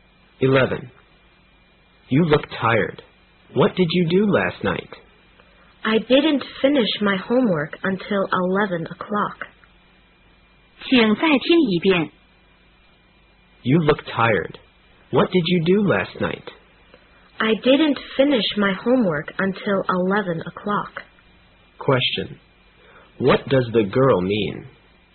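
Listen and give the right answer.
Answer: She stayed up late doing her homework.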